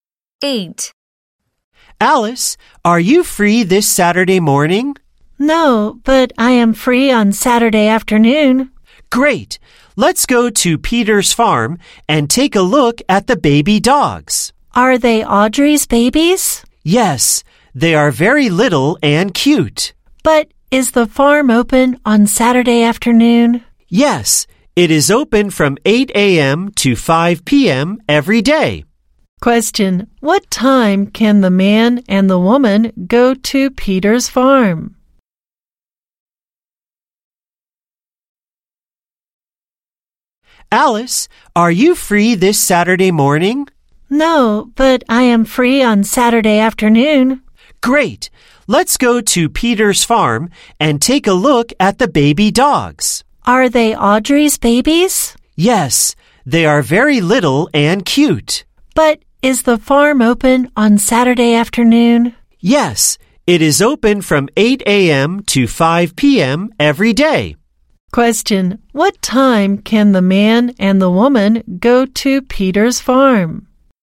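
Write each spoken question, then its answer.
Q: Question, what time can the man and the woman go to Peter's farm?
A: On Saturday afternoon, before 5 p.m.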